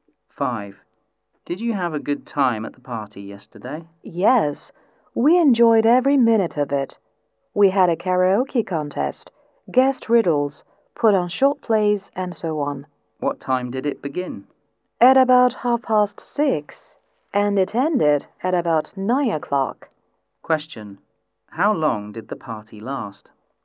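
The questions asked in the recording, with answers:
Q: How long did the party last?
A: About two and a half hours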